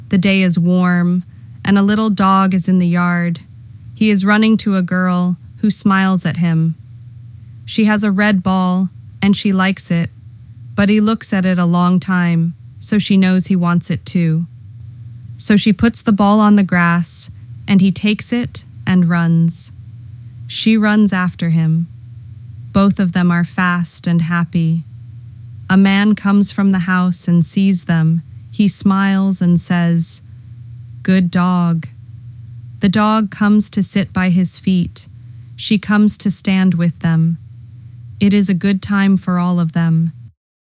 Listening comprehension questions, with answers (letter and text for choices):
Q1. What does the girl have?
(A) A blue hat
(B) A red ball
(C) A big box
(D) A little cat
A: (B) A red ball

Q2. What does the dog want?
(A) Food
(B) The ball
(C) To sleep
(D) To run away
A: (B) The ball

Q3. Where do the girl and the dog play?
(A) In the house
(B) On the road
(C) In the yard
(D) At the store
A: (C) In the yard

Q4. What does the dog do after the girl puts the ball on the grass?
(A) He sleeps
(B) He jumps to it and runs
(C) He sits down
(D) He goes inside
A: (B) He jumps to it and runs

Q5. Who comes from the house?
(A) A man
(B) A teacher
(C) A friend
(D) A baby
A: (A) A man

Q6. What does the man say?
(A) "Run fast!"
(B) "Good dog."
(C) "No ball."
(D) "Come home."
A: (B) "Good dog."

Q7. How do the girl and the dog feel when they play?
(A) Sad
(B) Tired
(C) Happy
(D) Angry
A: (C) Happy

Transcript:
The day is warm, and a little dog is in the yard; he is running to a girl, who smiles at him.
She has a red ball, and she likes it, but he looks at it a long time, so she knows he wants it too.
So, she puts the ball on the grass, and he takes it and runs. She runs after him. Both of them are fast and happy.
A man comes from the house and sees them, he smiles and says:
The dog comes to sit by his feet; she comes to stand with them.
It is a good time for all of them.